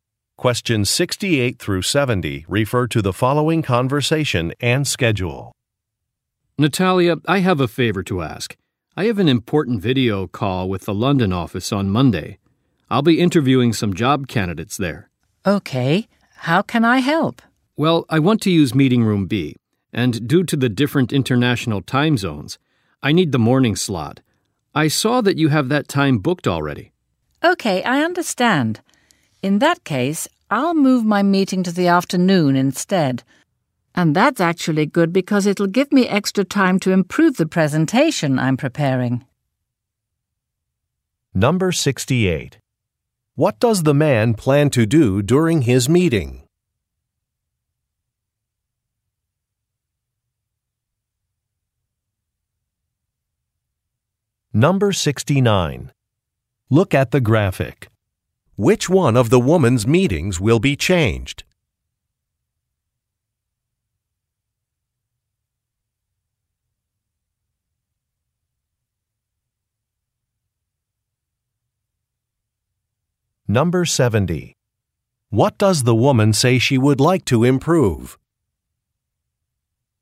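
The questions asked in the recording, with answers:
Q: What does the man plan to do during his meeting?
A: Interview job candidates

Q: What does the woman say she would like to improve?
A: A presentation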